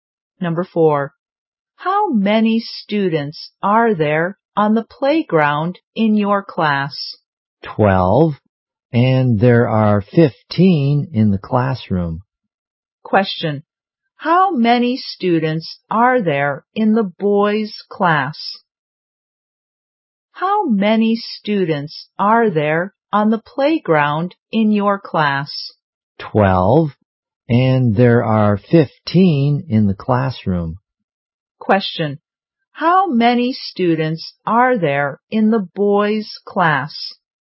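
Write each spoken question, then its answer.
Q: How many students are there in the boys' class?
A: 27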